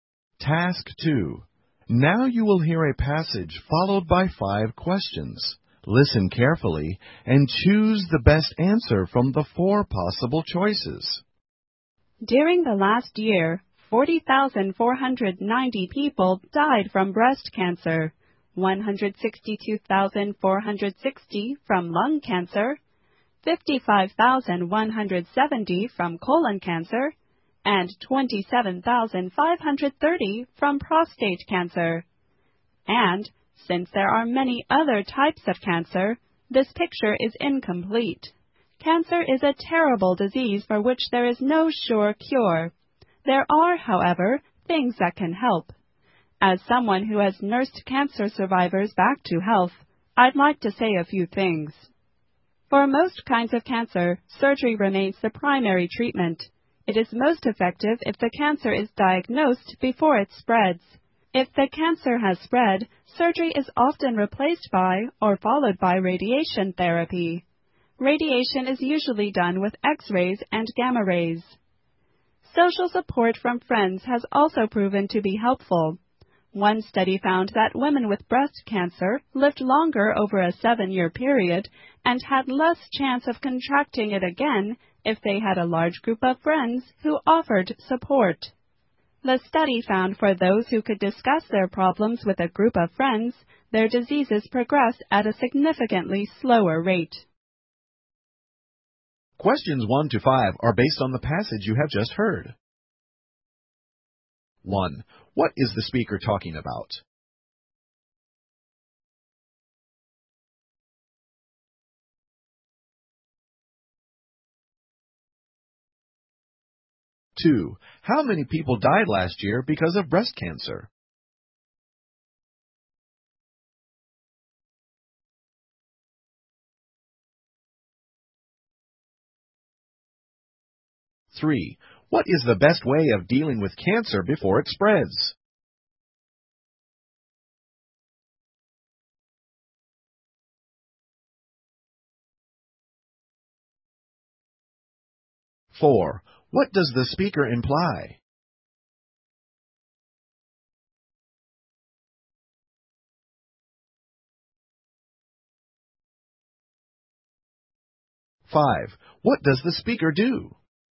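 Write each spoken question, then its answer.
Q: What is the speaker talking about?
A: Cancer and things that help treat it

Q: How many people died last year because of breast cancer?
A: 40,490

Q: What is the best way of dealing with cancer before it spreads?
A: Surgery

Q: What does the speaker do?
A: A nurse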